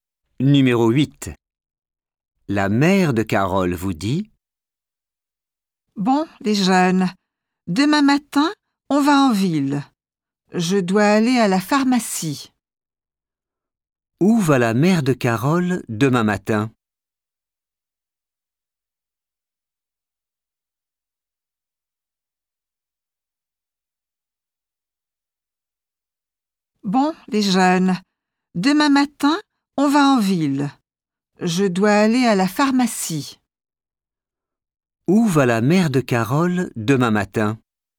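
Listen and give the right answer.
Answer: à la pharmacie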